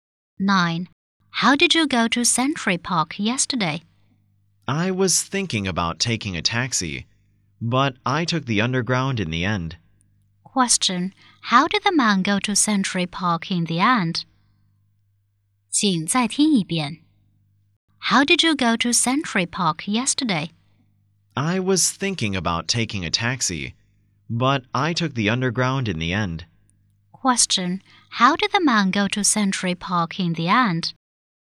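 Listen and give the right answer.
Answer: By underground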